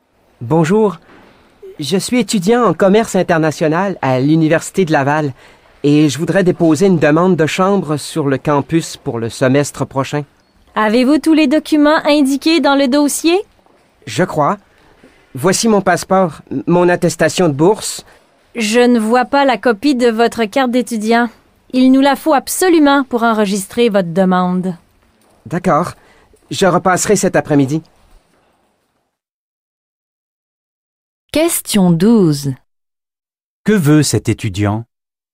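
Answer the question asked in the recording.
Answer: Déposer une demande de chambre sur le campus.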